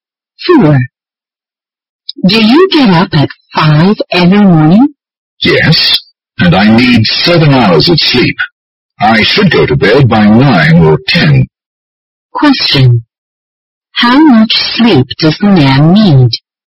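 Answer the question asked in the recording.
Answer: 7 hours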